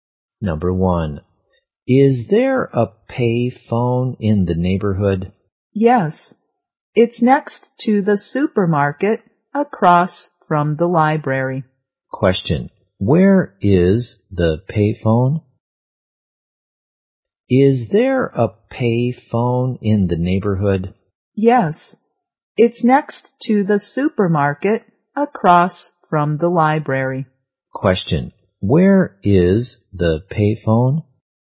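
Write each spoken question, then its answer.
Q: where is the payphone?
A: Next to the supermarket across from the library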